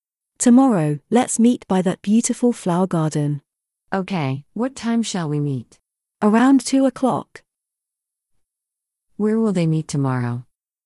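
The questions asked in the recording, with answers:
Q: Where will they meet tomorrow?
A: By the flower garden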